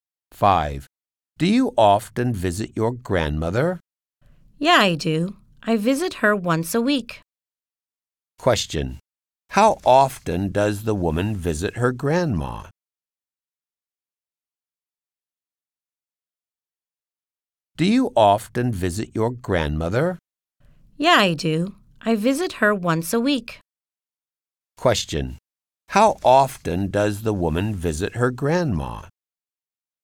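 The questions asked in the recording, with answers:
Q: How often does the woman visit her grandma?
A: Once a week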